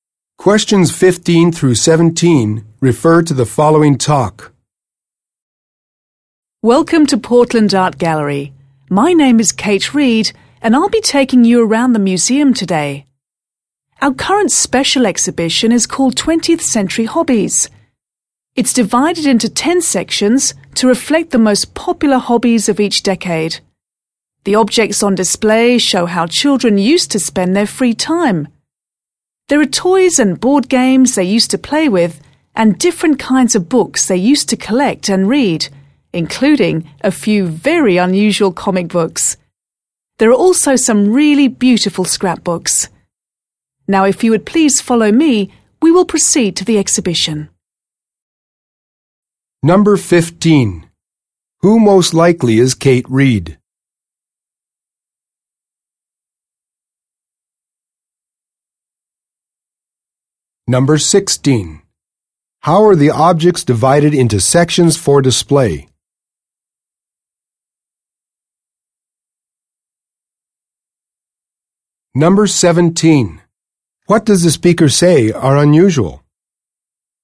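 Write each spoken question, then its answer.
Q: Who most likely is Kate Reed?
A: A museum tour guide

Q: How are the objects divided into sections for display?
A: By decade

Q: What does the speaker say are unusual?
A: A few comic books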